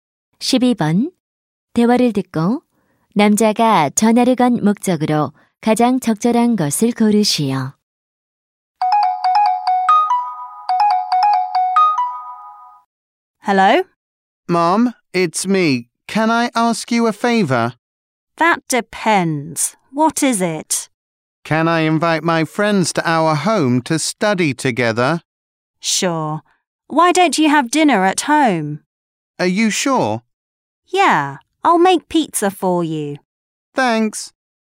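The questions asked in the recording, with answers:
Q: 대화를 듣고 남자가 전화를 건 목적으로 가장 적절한 것을 고르시오.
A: 친구들을 집에 초대해도 되는지 허락을 구하려고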